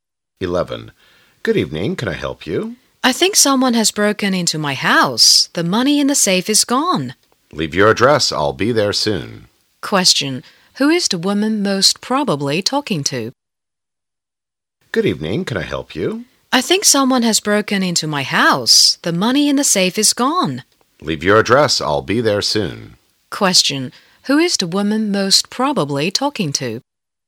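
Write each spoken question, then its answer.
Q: Who is the woman most probably talking to?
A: A policeman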